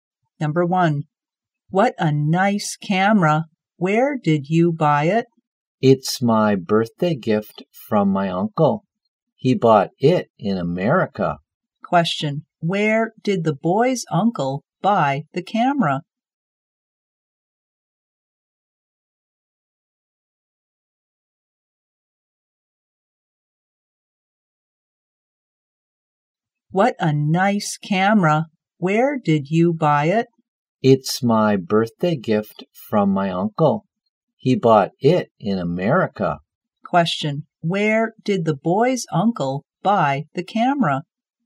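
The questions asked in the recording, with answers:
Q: where did the boy's uncle buy the camera?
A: In America.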